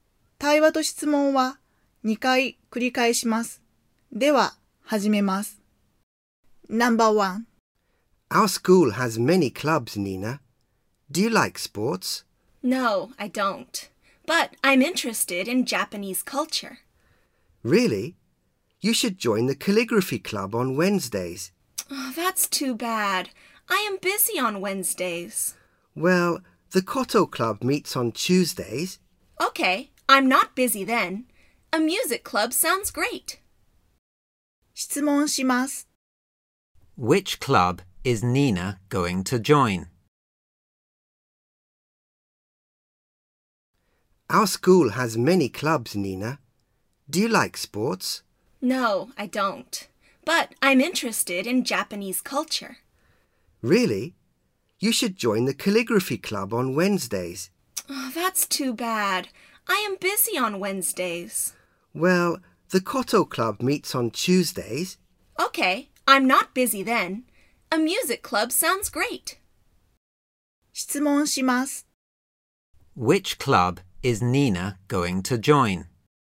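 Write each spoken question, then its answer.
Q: Which club is Nina going to join?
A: The koto club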